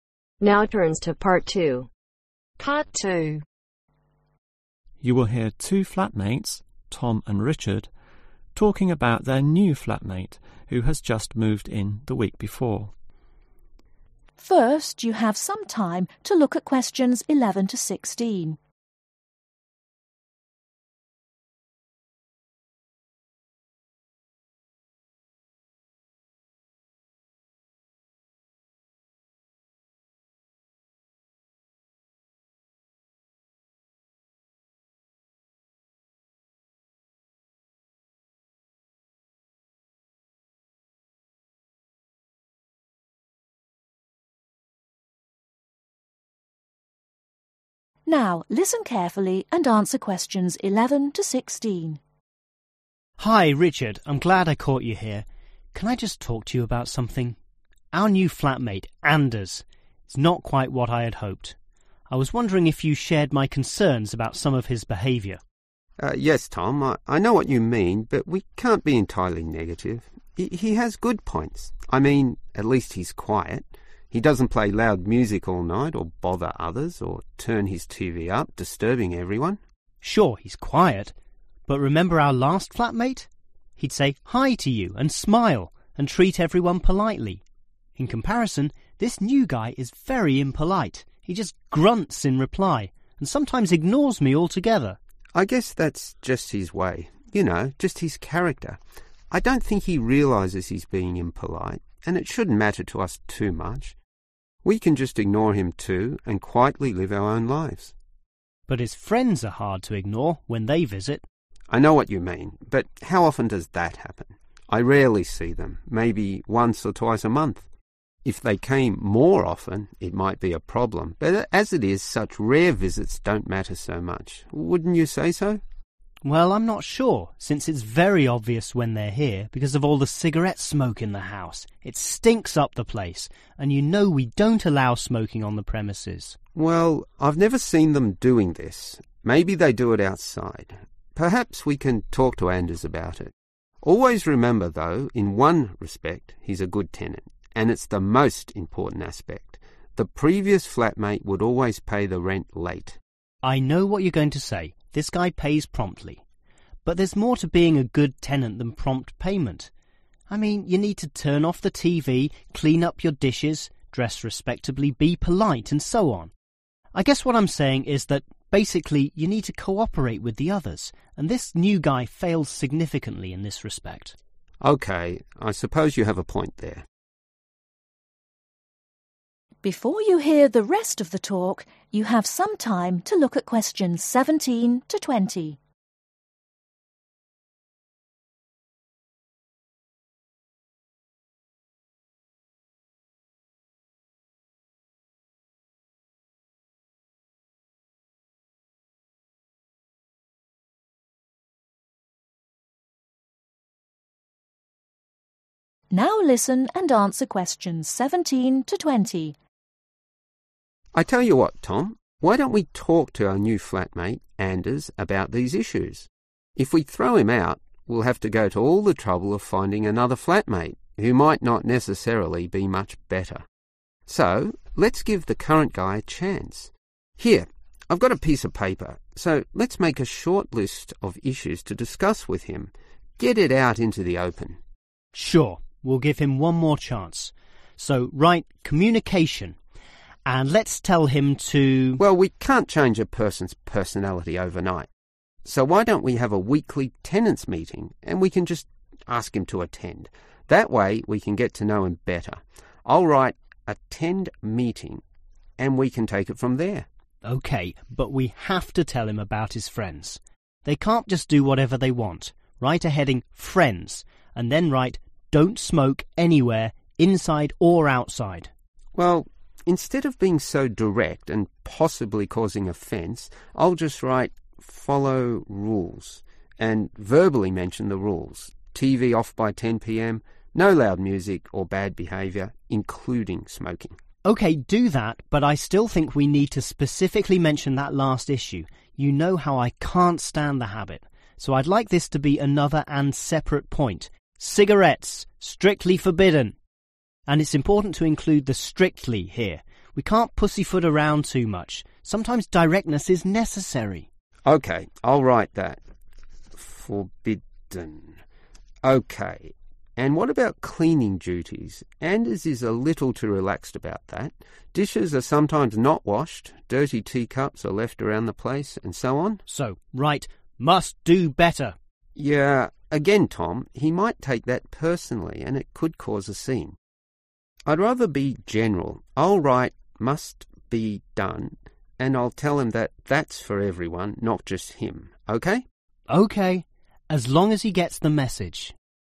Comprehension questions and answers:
Complete the table. Write ONE WORD ONLY for each answer.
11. He is (11) ............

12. He is (12) ............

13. His Friends visit (13) ............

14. They (14) ............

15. He Pays Rent (15) ............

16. He Doesn't (16) ............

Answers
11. quiet
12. impolite
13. rarely
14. smoke
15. promptly
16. co (-) operate